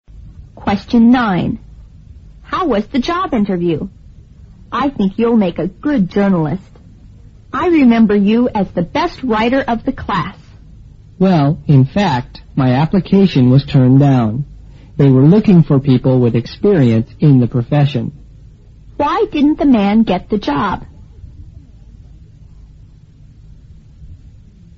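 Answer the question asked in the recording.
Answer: He had no experience in the profession.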